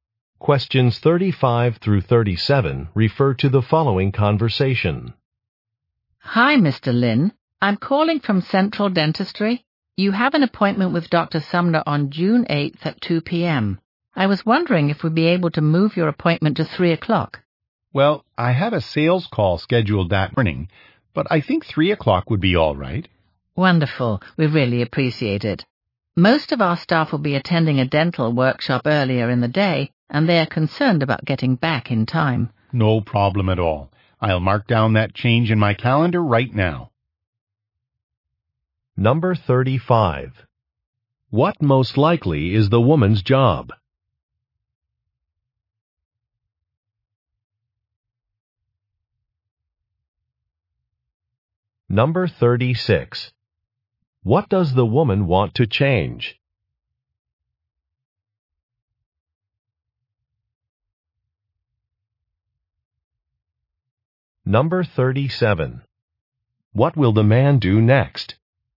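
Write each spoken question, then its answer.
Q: What most likely is the woman's job?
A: Dental office receptionist

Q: What does the woman want to change?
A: The appointment time

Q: What will the man do next?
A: Update his calendar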